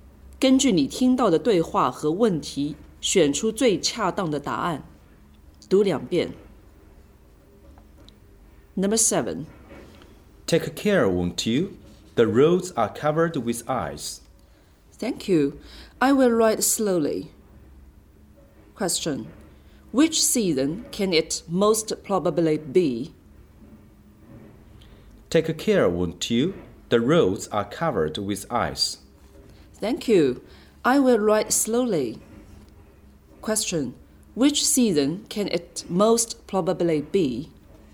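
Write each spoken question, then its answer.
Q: Which season can it most probably be?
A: Winter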